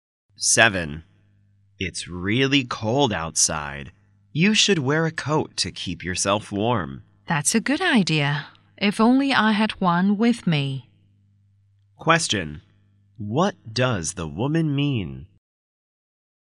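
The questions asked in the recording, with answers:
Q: What does the woman mean?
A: She doesn't have a coat with her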